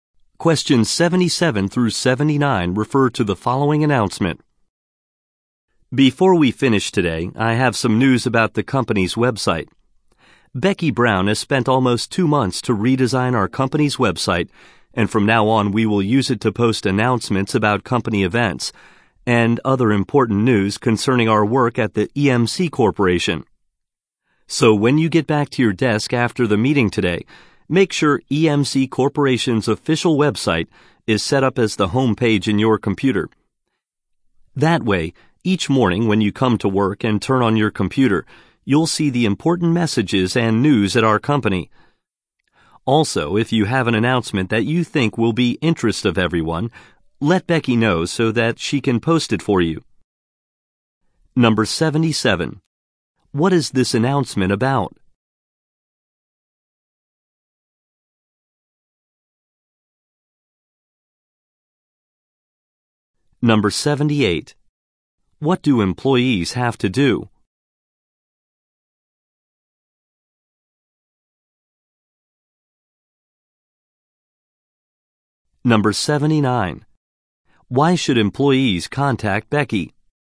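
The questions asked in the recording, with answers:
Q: What is this announcement about?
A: The redesigned company website

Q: What do employees have to do?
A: Set the company website as their home page

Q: Why should employees contact Becky?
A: To have an announcement posted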